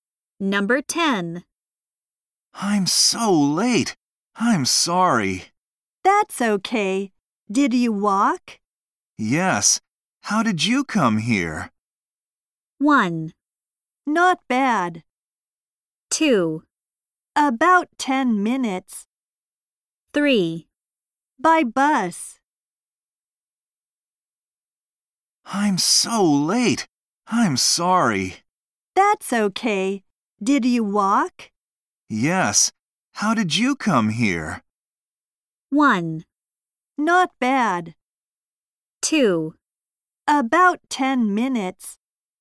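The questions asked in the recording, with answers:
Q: Yes. How did you come here?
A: 3: By bus.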